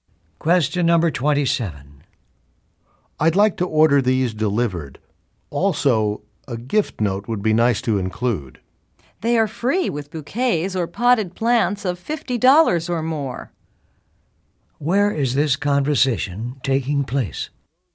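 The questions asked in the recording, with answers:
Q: Where is this conversation taking place?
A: At a flower shop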